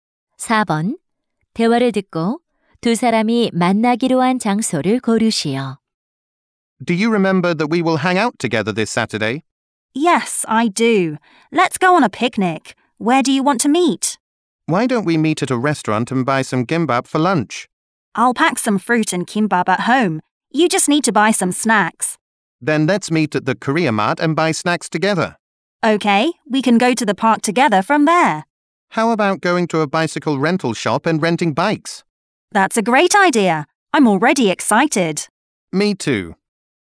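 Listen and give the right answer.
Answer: 코리아 마트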